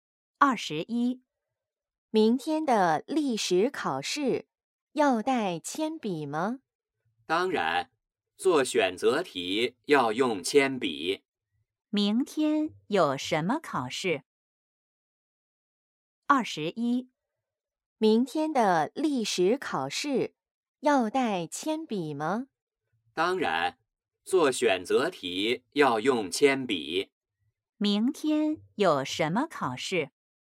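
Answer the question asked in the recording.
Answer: 历史考试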